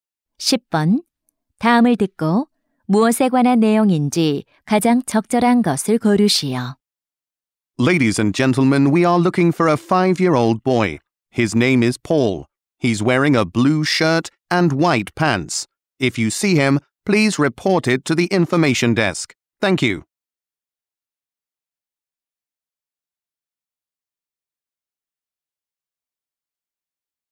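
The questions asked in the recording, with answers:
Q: 다음을 듣고 무엇에 관한 내용인지 가장 적절한 것을 고르시오.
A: 미아 찾기 안내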